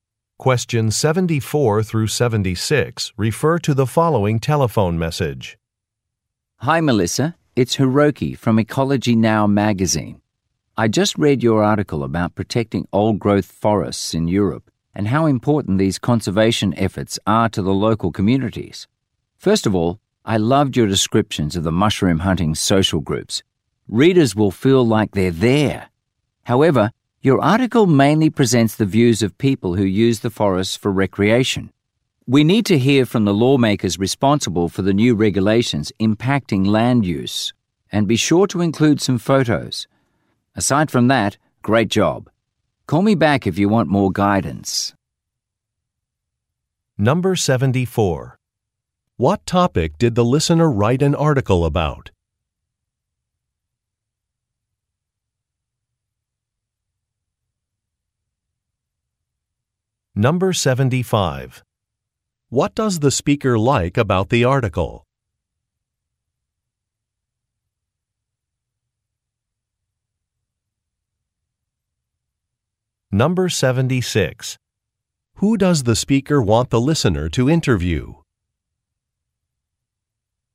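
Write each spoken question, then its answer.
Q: What topic did the listener write an article about?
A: Protecting old-growth forests in Europe

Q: What does the speaker like about the article?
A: The descriptions of the mushroom-hunting social groups

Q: Who does the speaker want the listener to interview?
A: Lawmakers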